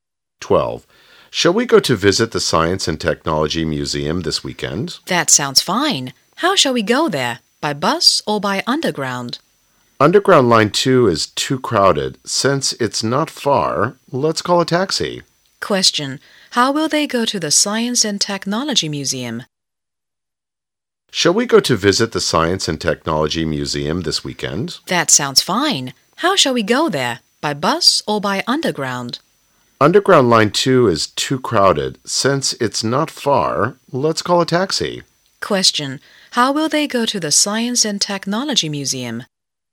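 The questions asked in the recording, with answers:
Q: Question. How will they go to the Science and Technology Museum?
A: By taxi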